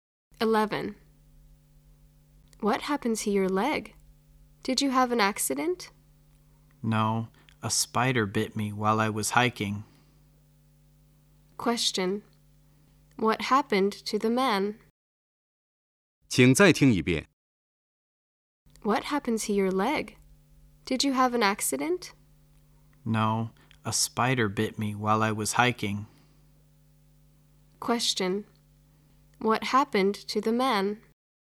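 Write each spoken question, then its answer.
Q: What happened to the man?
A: A spider bit him while he was hiking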